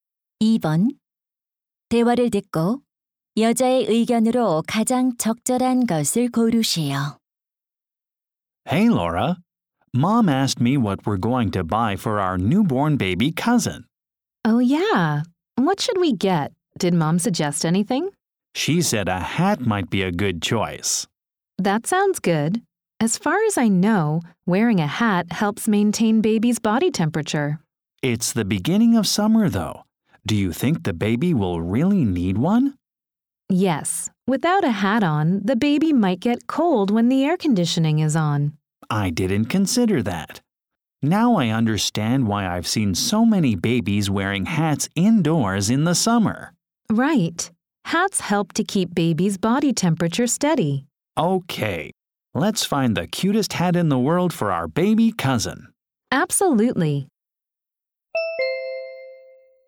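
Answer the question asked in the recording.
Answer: 모자는 아기의 체온을 유지하는 데 도움이 된다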